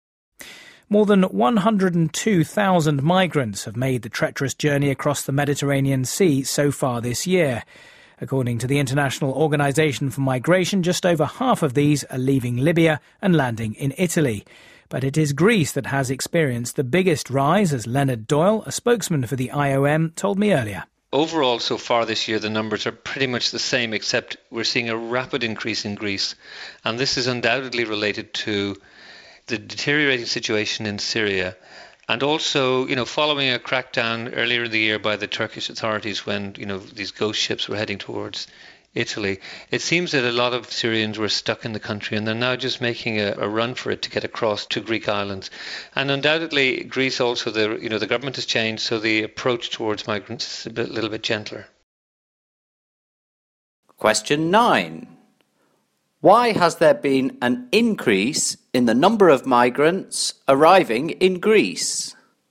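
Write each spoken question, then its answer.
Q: Why has there been an increase in the number of migrants arriving in Greece?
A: The worsening situation in Syria, the Turkish crackdown on ships to Italy, and a gentler Greek government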